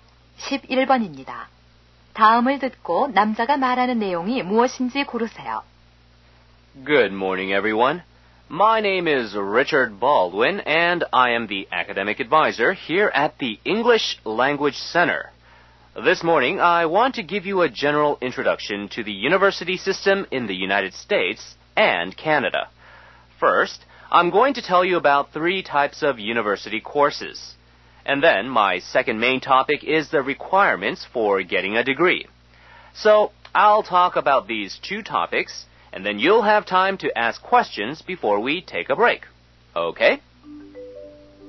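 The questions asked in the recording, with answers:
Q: 다음을 듣고 남자가 말하는 내용이 무엇인지 고르세요.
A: 미국과 캐나다의 대학 제도 소개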